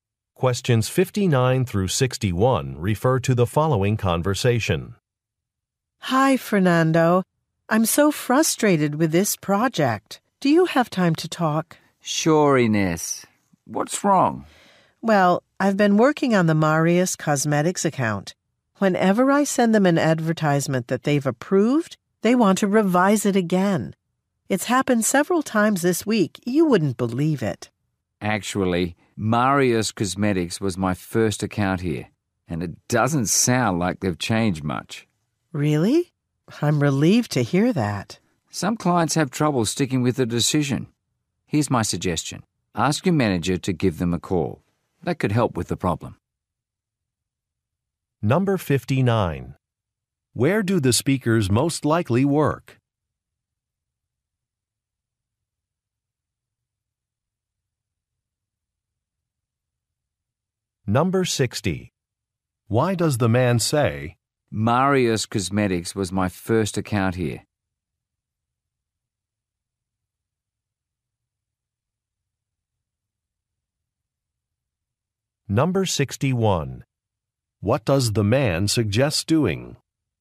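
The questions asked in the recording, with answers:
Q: Where do the speakers most likely work?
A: At an advertising agency

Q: Why does the man say,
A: To show the client has always behaved this way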